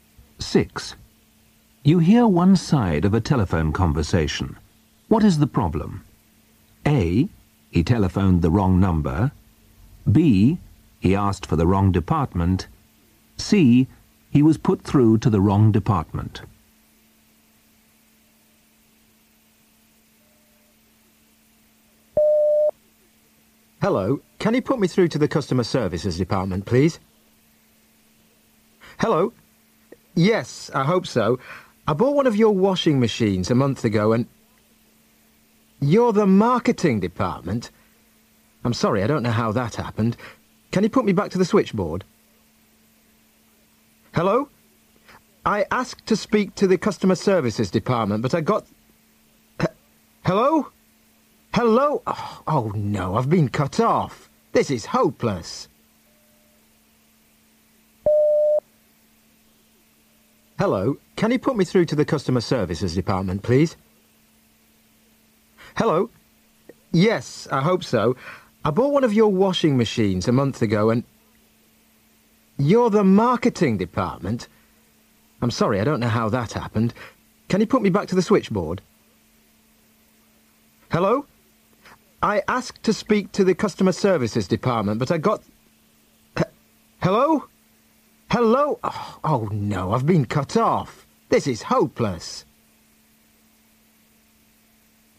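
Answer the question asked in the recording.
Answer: C: He was put through to the wrong department.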